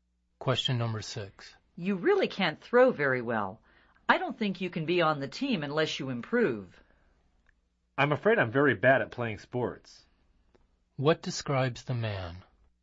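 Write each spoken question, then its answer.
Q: What describes the man?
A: He is very bad at playing sports.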